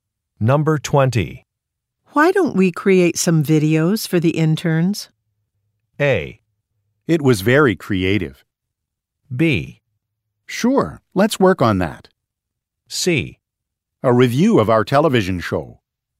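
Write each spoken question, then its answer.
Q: Why don't we create some videos for the interns?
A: B: Sure, let's work on that.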